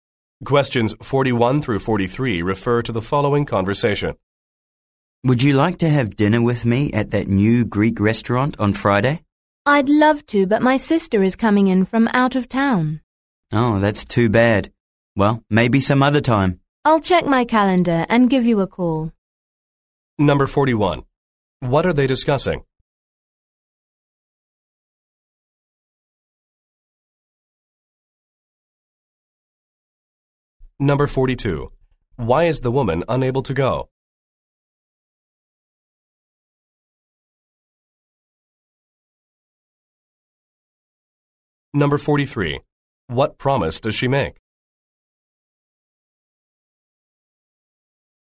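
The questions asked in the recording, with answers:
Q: What are they discussing?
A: Having dinner together at a new Greek restaurant on Friday

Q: Why is the woman unable to go?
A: Her sister is coming in from out of town

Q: What promise does she make?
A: To check her calendar and call him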